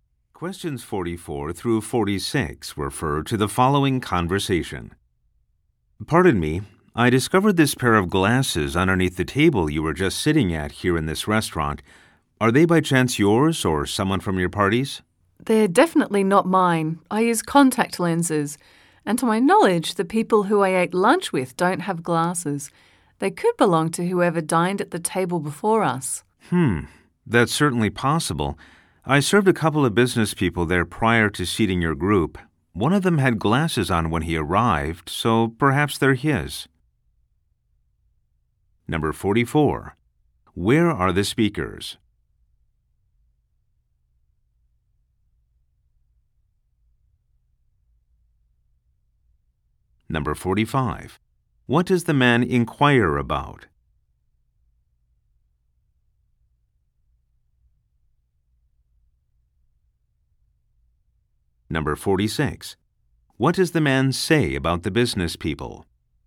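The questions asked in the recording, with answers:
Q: Where are the speakers?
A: In a restaurant

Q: What does the man inquire about?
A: Whether a pair of glasses belongs to the woman or her party

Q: What does the man say about the business people?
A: They sat at the table before, and one wore glasses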